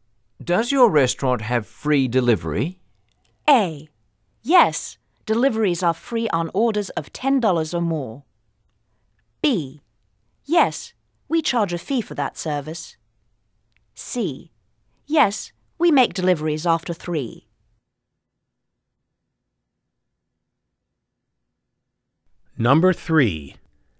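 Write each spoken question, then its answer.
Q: Does your restaurant have free delivery?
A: A: Yes, deliveries are free on orders of $10 or more.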